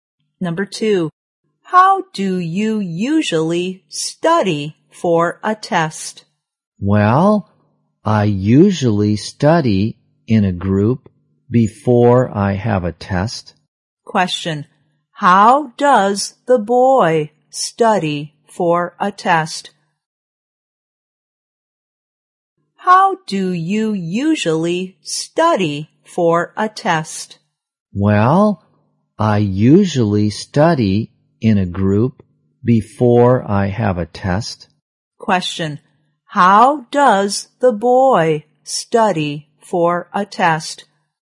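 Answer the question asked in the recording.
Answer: By studying in a group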